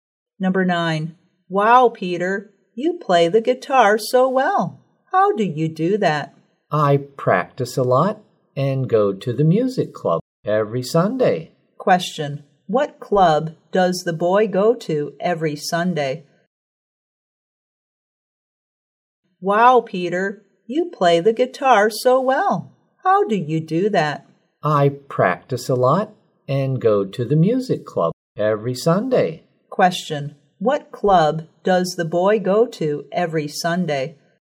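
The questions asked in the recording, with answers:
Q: Question. What club does the boy go to every Sunday?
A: The music club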